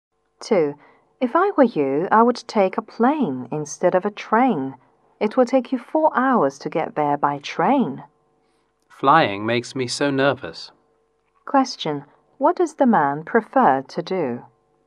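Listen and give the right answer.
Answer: Take a train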